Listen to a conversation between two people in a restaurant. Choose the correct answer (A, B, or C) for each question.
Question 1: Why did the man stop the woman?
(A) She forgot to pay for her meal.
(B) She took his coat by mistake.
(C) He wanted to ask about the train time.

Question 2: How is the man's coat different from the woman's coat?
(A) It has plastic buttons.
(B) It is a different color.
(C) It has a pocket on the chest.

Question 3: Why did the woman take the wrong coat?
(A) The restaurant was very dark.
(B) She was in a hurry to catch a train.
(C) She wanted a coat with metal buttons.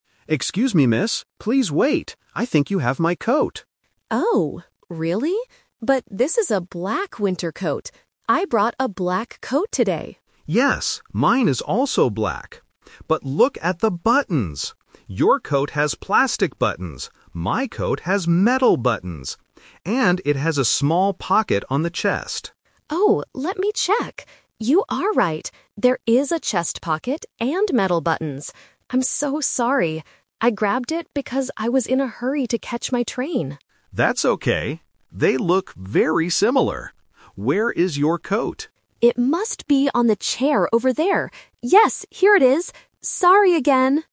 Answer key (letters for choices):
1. B
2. C
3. B

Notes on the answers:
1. The man stops her at the beginning and says, "I think you have my coat." Trap: Option C is a trap because the word "train" is mentioned later by the woman, but it wasn't the man's reason for stopping her. Option A is a common restaurant situation but is never mentioned.
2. The man describes his coat to prove it is his: "My coat has metal buttons. And it has a small pocket on the chest." Trap: Option A is a trap because "plastic buttons" belong to the woman's coat, not the man's. Option B is incorrect because they explicitly agree that both coats are black ("mine is also black").
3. The woman explains her mistake by saying, "I grabbed it because I was in a hurry to catch my train." Trap: Option A is a plausible reason for grabbing the wrong coat, but it is not mentioned in the audio. Option C is incorrect because she didn't take it on purpose; it was an accident.

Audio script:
Man: Excuse me, miss! Please wait! I think you have my coat.
Woman: Oh? Really? But this is a black winter coat. I brought a black coat today.
Man: Yes, mine is also black. But look at the buttons. Your coat has plastic buttons. My coat has metal buttons. And it has a small pocket on the chest.
Woman: Oh, let me check... You are right! There is a chest pocket and metal buttons. I'm so sorry. I grabbed it because I was in a hurry to catch my train.
Man: That's okay. They look very similar. Where is your coat?
Woman: It must be on the chair over there. Yes, here it is. Sorry again!